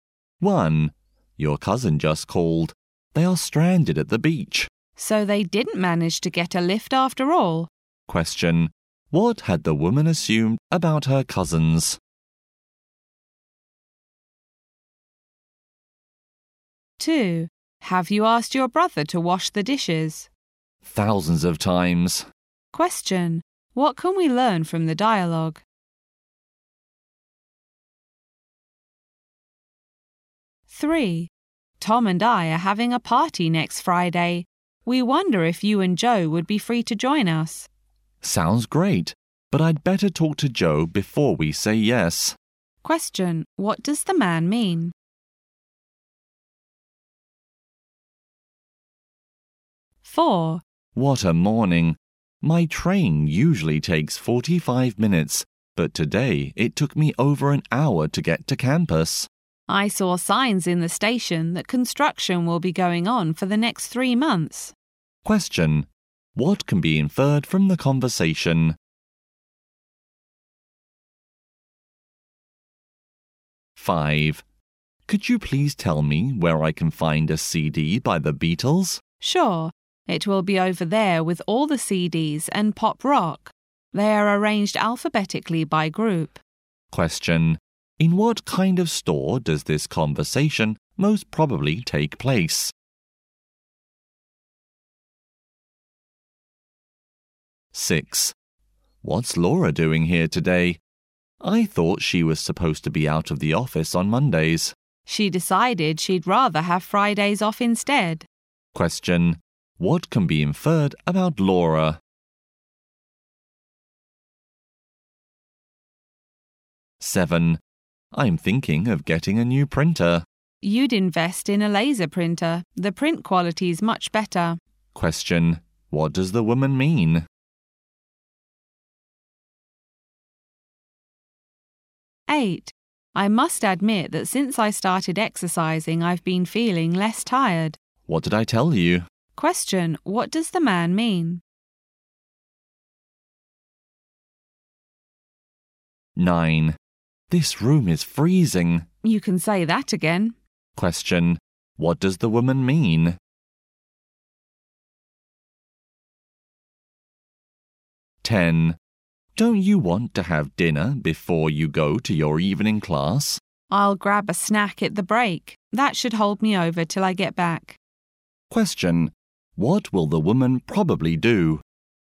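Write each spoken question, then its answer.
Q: What had the woman assumed about her cousins?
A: That they had gotten a lift

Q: What can we learn from the dialogue?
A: The brother still hasn't washed the dishes though asked many times

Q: What does the man mean?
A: He must check with Joe before accepting

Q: What can be inferred from the conversation?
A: Construction will delay the train for the next 3 months

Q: In what kind of store does this conversation most probably take place?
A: A music (CD) store

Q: What can be inferred about Laura?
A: She now takes Fridays off instead of Mondays

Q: What does the woman mean?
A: He should buy a laser printer

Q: What does the woman mean?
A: She agrees the room is very cold

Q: What will the woman probably do?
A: Have a snack during the class break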